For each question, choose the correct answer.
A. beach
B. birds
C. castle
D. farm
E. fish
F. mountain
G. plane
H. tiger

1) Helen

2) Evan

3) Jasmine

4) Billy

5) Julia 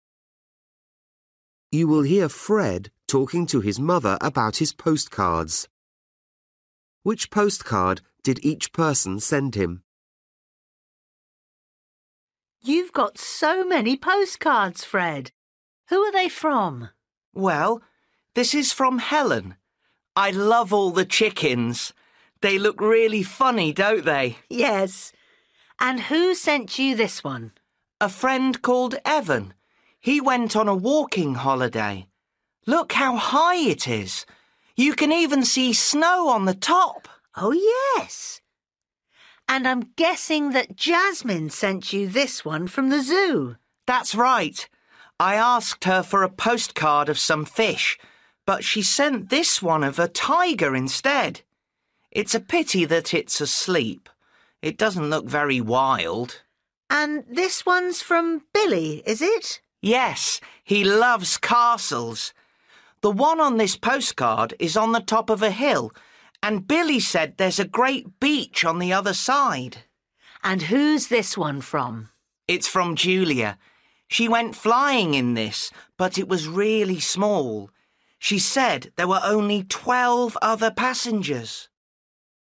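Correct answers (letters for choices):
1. D
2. F
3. H
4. C
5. G

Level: Luyện nghe trình độ A2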